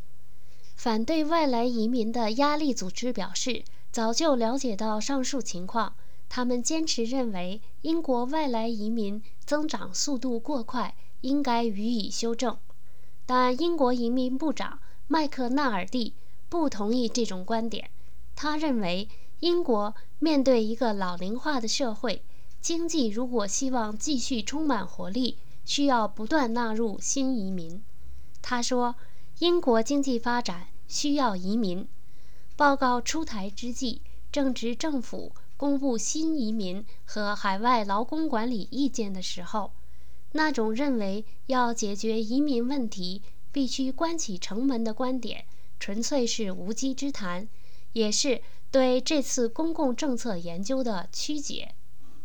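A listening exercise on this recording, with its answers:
Please answer the following questions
为什么英国移民部长麦克纳尔蒂认为英国需要不断纳入新移民?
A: 英国面对老龄化社会,经济要继续充满活力就需要新移民

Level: 3rd Year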